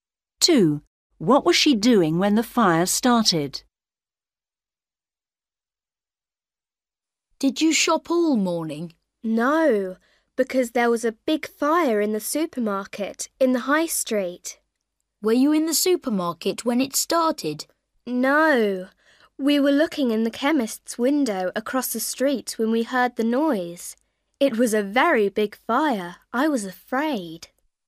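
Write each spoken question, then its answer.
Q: What was she doing when the fire started?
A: looking in the chemist's window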